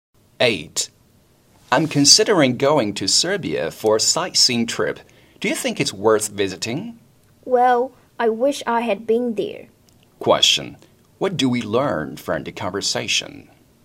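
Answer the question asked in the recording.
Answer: The woman has never been to Serbia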